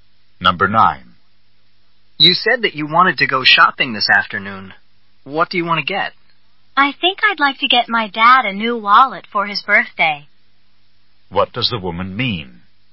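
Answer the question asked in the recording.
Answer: She wants to buy her dad a new wallet for his birthday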